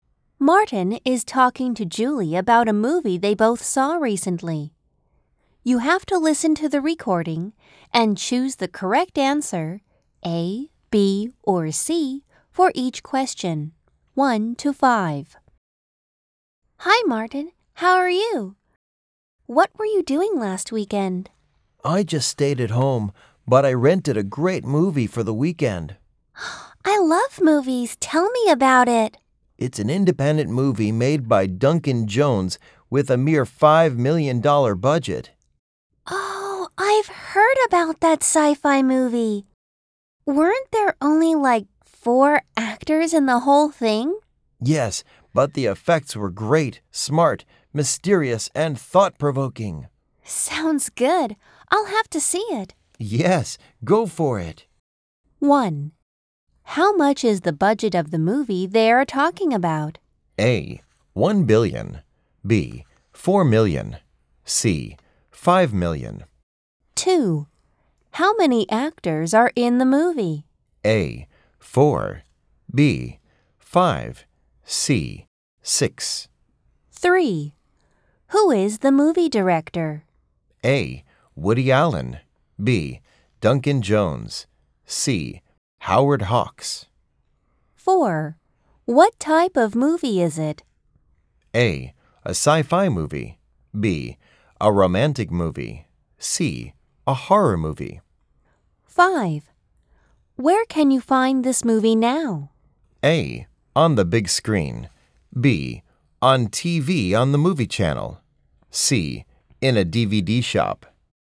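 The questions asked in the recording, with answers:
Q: How much is the budget of the movie they are talking about?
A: C: 5 million

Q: How many actors are in the movie?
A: A: 4

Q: Who is the movie director?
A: B: Duncan Jones

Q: What type of movie is it?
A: A: A sci-fi movie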